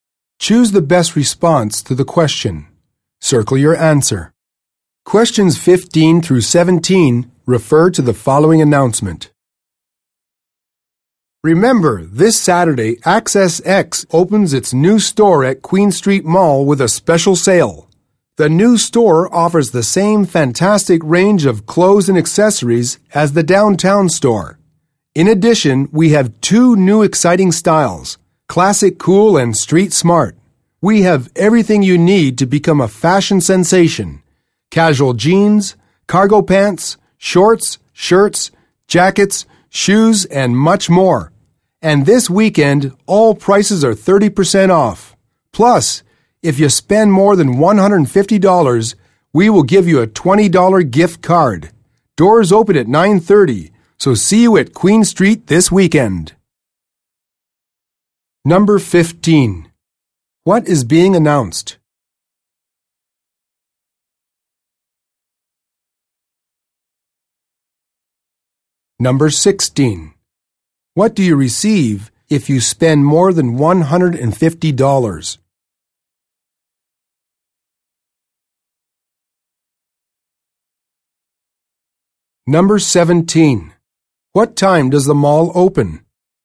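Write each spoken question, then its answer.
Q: What is being announced?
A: The opening of a new store with a special sale

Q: What do you receive if you spend more than $150?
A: A $20 gift card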